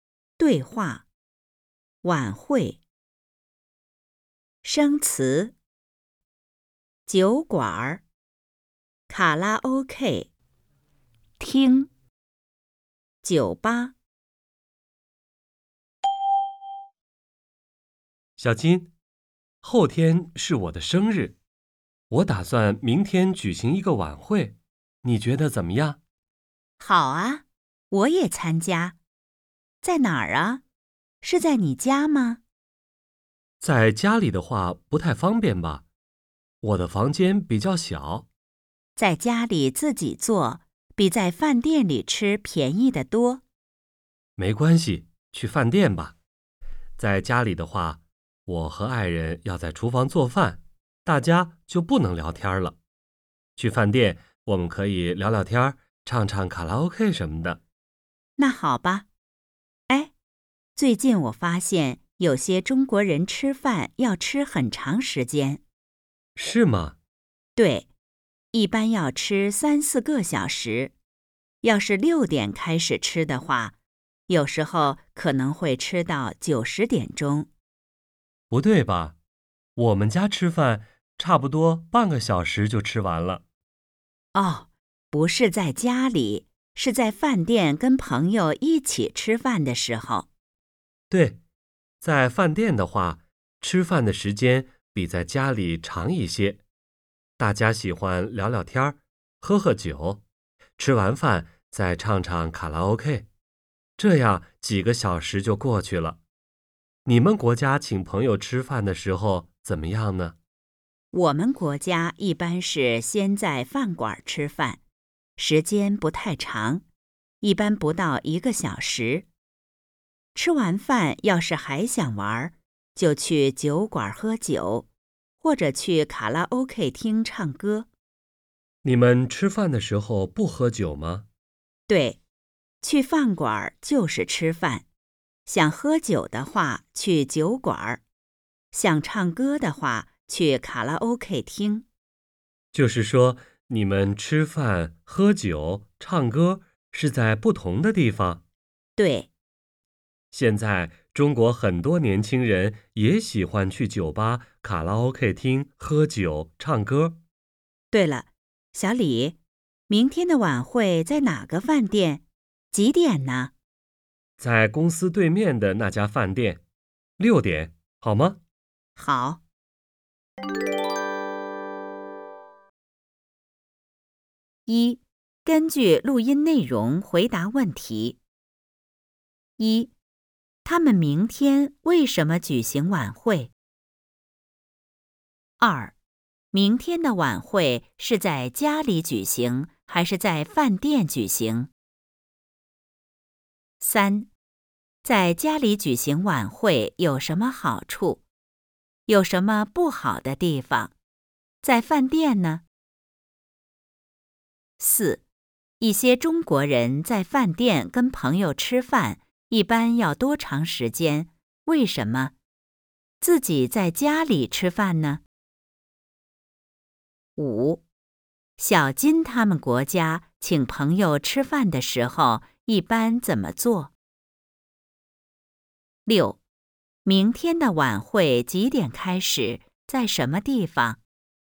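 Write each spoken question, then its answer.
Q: 他们明天为什么举行晚会?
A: 因为后天是小李的生日

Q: 明天的晚会是在家里举行还是在饭店举行?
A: 在饭店

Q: 在家里举行晚会有什么好处?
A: 比在饭店吃便宜得多

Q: 有什么不好的地方?在饭店呢?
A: 家里房间小,要做饭不能聊天;在饭店可以聊天、唱卡拉OK

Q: 一些中国人在饭店跟朋友吃饭,一般要多长时间?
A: 3-4个小时

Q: 为什么?自己在家里吃饭呢?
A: 大家喜欢聊天、喝酒、唱卡拉OK;在家里半个小时左右

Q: 小金他们国家请朋友吃饭的时候,一般怎么做?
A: 先在饭馆吃饭,不到1个小时,然后去酒馆喝酒或去卡拉OK厅唱歌

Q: 明天的晚会几点开始?在什么地方?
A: 6点,在公司对面的那家饭店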